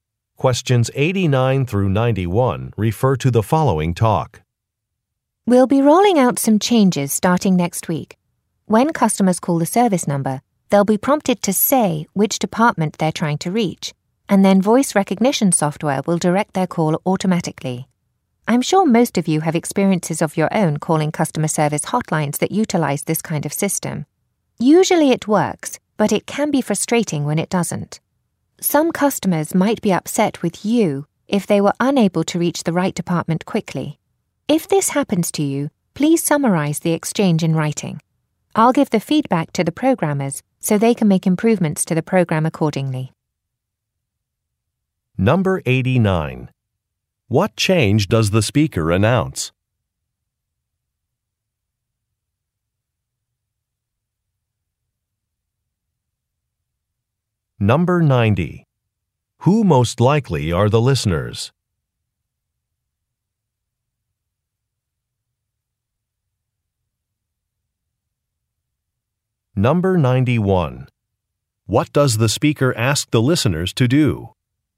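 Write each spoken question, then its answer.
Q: What change does the speaker announce?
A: Calls will be directed automatically by voice recognition software

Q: Who most likely are the listeners?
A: Customer service representatives

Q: What does the speaker ask the listeners to do?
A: Write a summary of exchanges with upset customers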